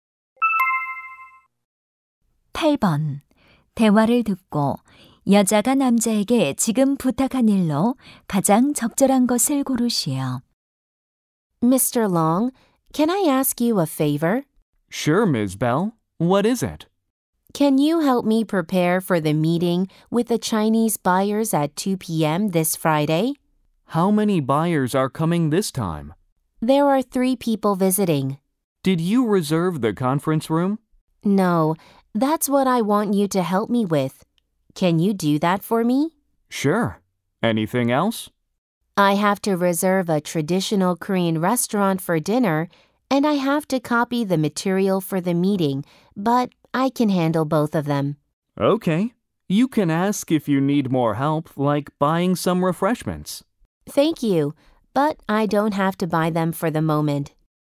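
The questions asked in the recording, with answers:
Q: 대화를 듣고 여자가 남자에게 지금 부탁한 일로 가장 적절한 것을 고르시오.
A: 회의실 예약하기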